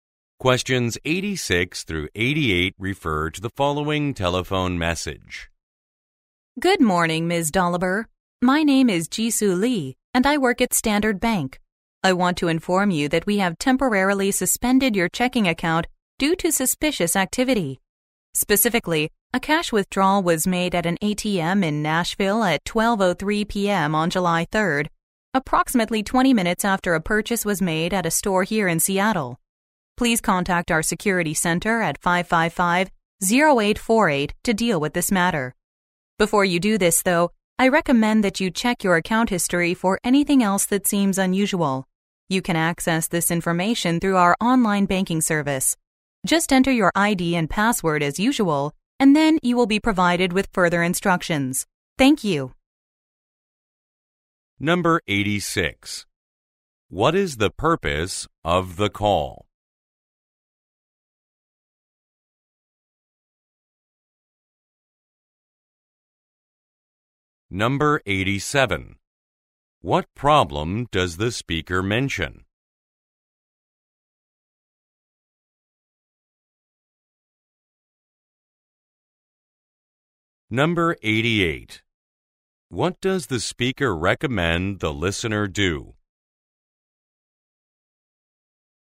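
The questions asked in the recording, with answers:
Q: What is the purpose of the call?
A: To inform the listener that her checking account has been temporarily suspended

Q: What problem does the speaker mention?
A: Suspicious activity: an ATM cash withdrawal in Nashville about 20 minutes after a purchase in Seattle

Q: What does the speaker recommend the listener do?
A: Check her account history for anything else that seems unusual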